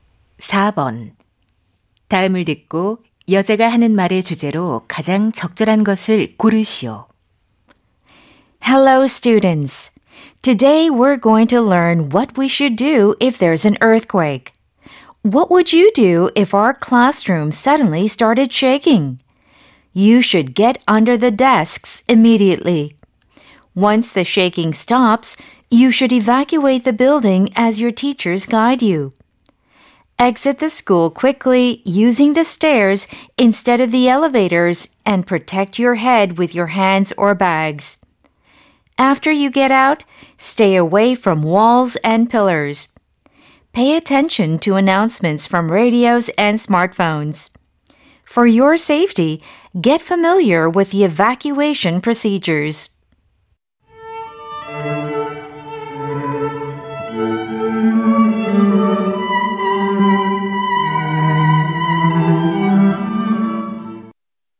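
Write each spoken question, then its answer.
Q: 다음을 듣고 여자가 하는 말의 주제로 가장 적절한 것을 고르시오.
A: 지진 발생 시 대피 요령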